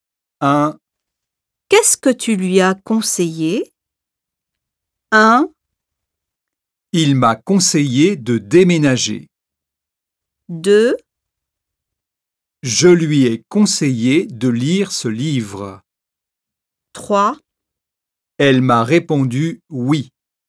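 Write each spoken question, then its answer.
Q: Qu'est-ce que tu lui as conseillé?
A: 2: Je lui ai conseillé de lire ce livre.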